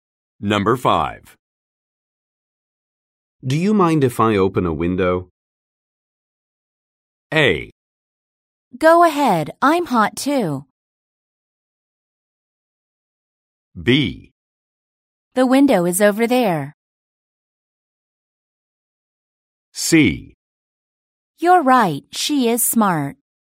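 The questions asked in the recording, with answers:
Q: Do you mind if I open a window?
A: A: Go ahead, I'm hot too.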